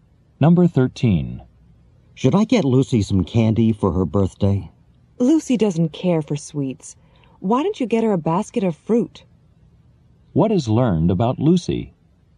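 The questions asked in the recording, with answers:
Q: What is learned about Lucy?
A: She doesn't like sweets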